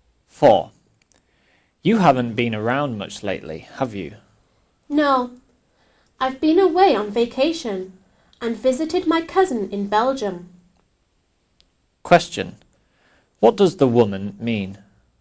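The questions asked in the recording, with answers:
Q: What does the woman mean?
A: She has been away on vacation visiting her cousin in Belgium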